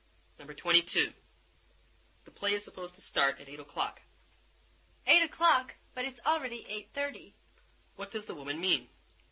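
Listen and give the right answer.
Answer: The play is already late; it should have started by now.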